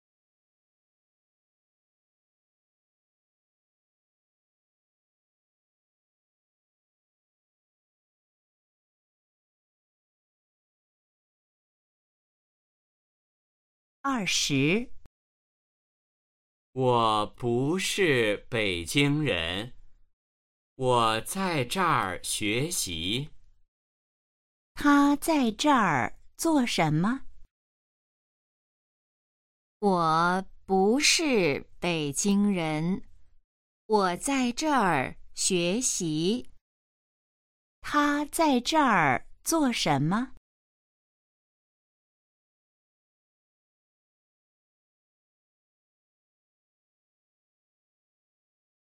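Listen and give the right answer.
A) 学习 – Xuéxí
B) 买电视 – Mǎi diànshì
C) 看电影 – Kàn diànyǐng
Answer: A) 学习 – Xuéxí

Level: HSK1- Đề 04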